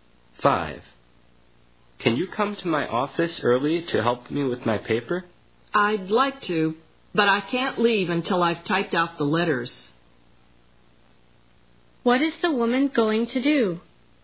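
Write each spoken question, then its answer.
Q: What is the woman going to do?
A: Type out the letters first.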